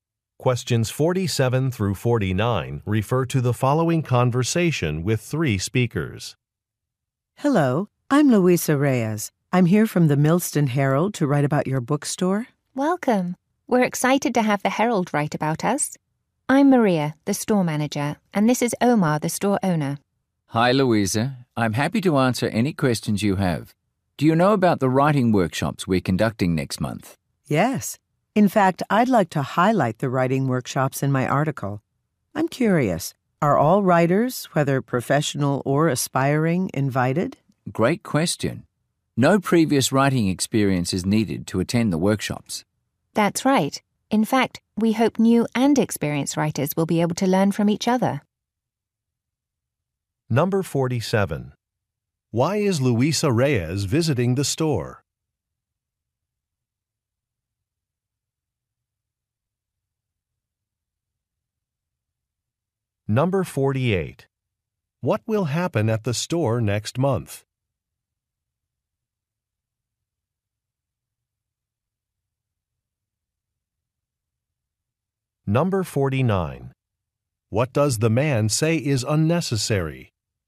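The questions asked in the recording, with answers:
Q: Why is Luisa Reyes visiting the store?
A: To write a newspaper article

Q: What will happen at the store next month?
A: Writing workshops

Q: What does the man say is unnecessary?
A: Previous writing experience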